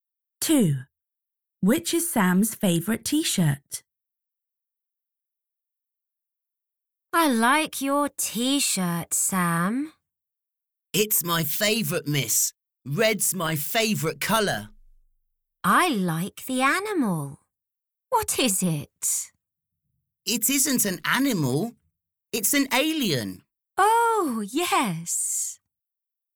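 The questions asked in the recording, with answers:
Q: Which is Sam's favourite T-shirt?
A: the red T-shirt with an alien on it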